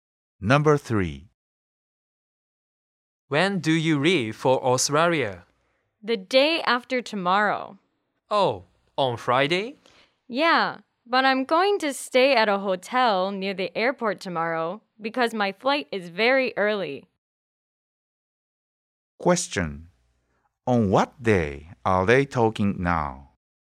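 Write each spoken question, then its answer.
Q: On what day are they talking now?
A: Wednesday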